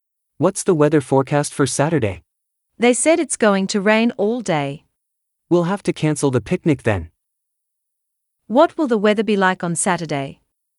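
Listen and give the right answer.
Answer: rainy all day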